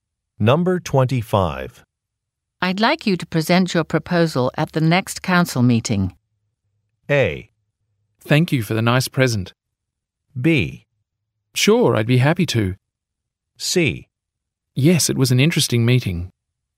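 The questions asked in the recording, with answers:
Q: I'd like you to present your proposal at the next council meeting.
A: B: Sure, I'd be happy to.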